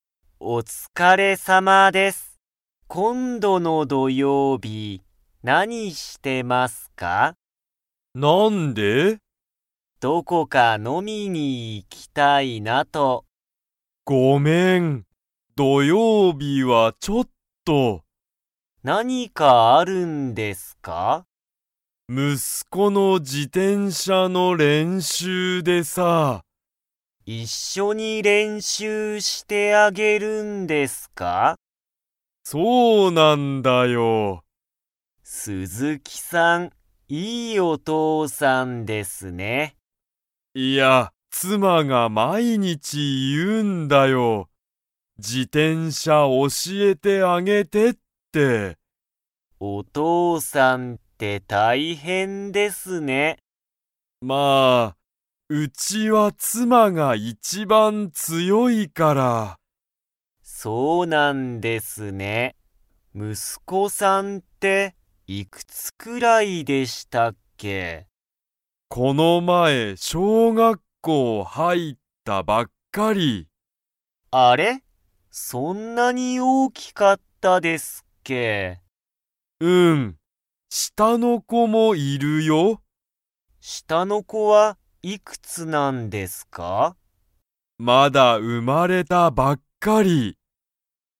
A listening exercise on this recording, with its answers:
Comprehension Quiz (Skip if you don't understand the conversation yet)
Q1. 鈴木すずきさんは、今度こんどの土曜日どようびに中村なかむらさんと 。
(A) 飲のみに行いく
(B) 飲のみに行いかない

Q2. 鈴木すずきさんの家いえでは、誰だれが一番いちばん強つよいですか?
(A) 鈴木すずきさん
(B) 息子むすこ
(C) 妻つま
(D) 中村なかむらさん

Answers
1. (B) 飲のみに行いかない
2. (C) 妻つま

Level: Level 3

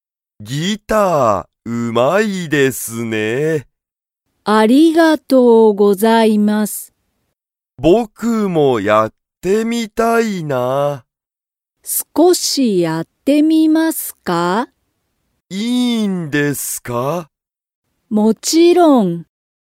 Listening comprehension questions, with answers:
たけるもギターをやってみたいですか?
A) はい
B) いいえ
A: A) はい

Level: Level 1

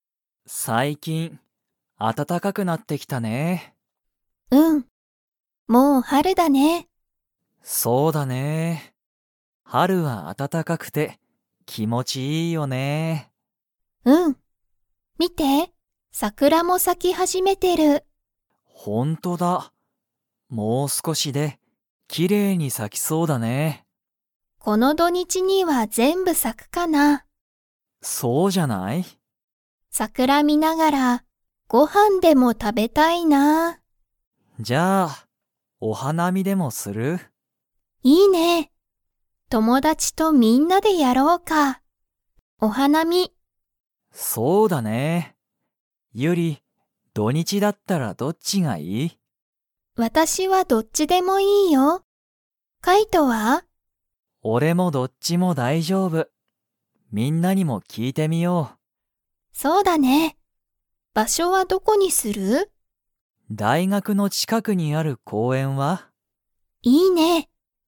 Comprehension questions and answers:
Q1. 暖あたたかくなってきたので、 が咲さき始はじめている。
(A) 桜さくら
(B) 公園こうえん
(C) 花見はなみ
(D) 山やま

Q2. カイトとユリは、二人ふたりだけでお花見はなみをするつもりですか?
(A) はい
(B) いいえ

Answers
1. (A) 桜さくら
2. (B) いいえ

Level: Level 4

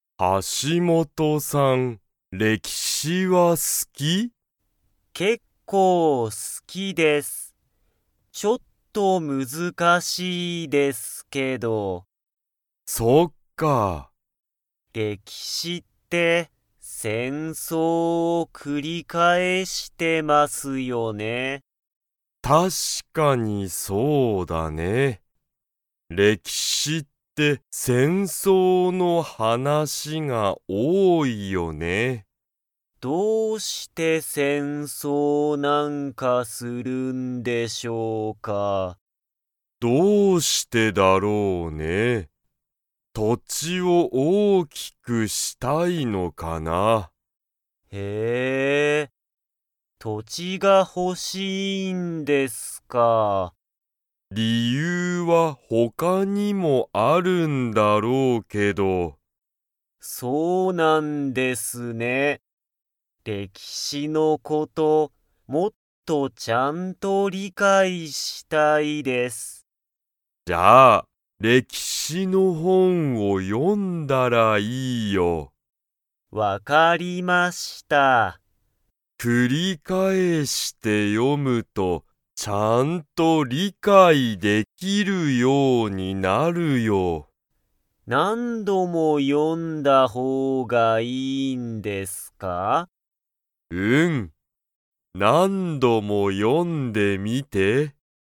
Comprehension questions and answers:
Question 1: 歴史れきしって の話はなしが多おおい。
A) 土地とち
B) 戦争せんそう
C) 理解りかい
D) 理由りゆう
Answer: B) 戦争せんそう

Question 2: 橋本はしもとさんは、歴史れきしのことを 。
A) もっと理解りかいしたい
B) あまり理解りかいしたくない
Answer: A) もっと理解りかいしたい

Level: Level 3

